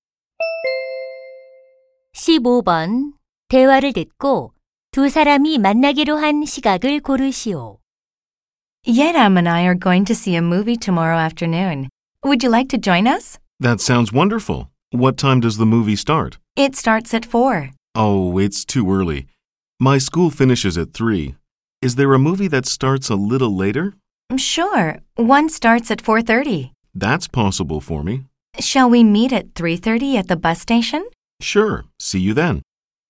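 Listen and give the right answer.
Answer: 3시 30분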